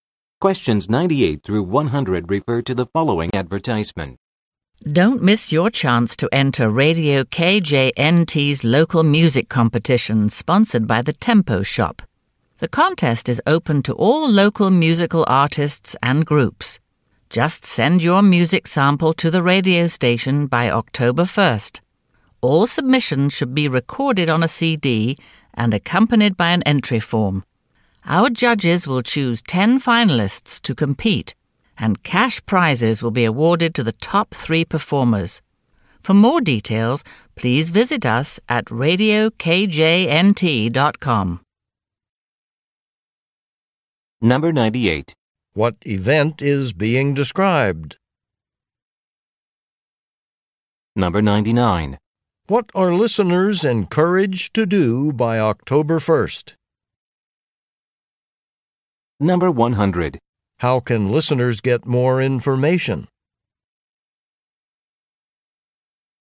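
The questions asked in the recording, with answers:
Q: What event is being described?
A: A local music competition

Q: What are listeners encouraged to do by October 1st?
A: Send a music sample to the radio station

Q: How can listeners get more information?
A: By visiting radiokjnt.com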